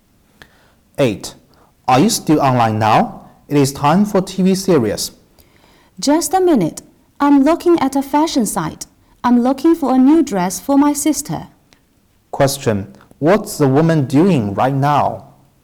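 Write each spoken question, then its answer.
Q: What's the woman doing right now?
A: Looking at a fashion website for a dress for her sister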